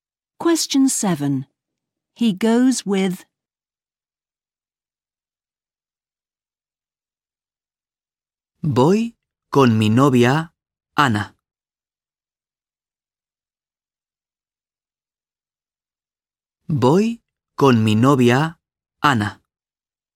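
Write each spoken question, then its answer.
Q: He goes with...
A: his girlfriend, Ana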